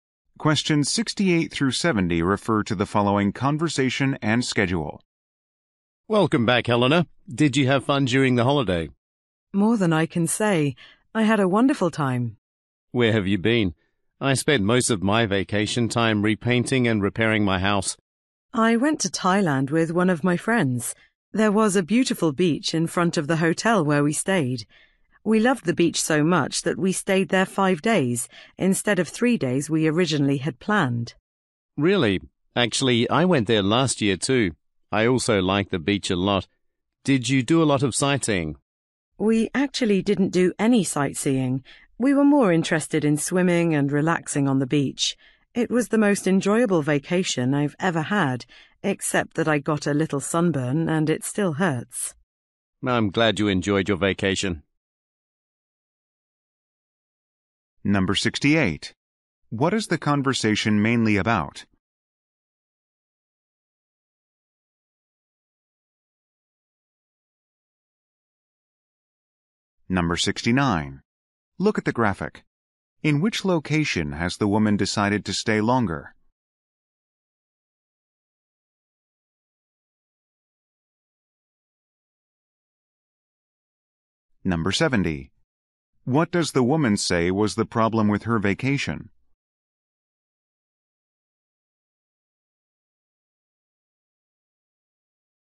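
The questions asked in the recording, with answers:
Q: What is the conversation mainly about?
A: The woman's vacation

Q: What does the woman say was the problem with her vacation?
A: She got a sunburn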